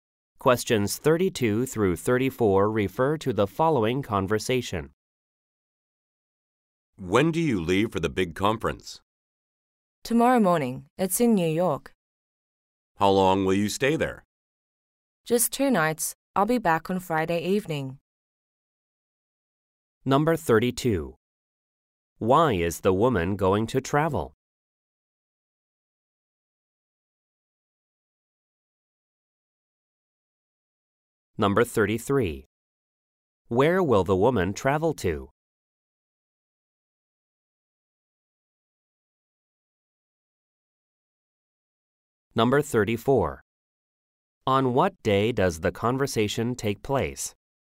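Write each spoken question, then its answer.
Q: Why is the woman going to travel?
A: For a conference

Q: Where will the woman travel to?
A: New York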